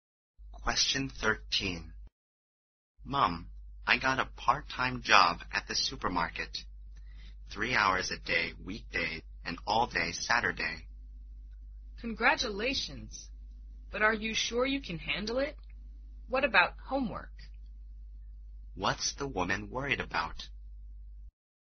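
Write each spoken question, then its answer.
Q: What's the woman worried about?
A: That the job will leave him no time for homework.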